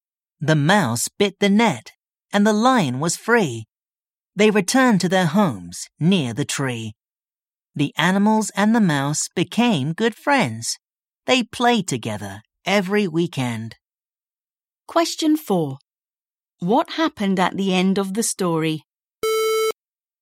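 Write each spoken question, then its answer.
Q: What happened at the end of the story?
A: The mouse freed the lion and the animals and the mouse became good friends.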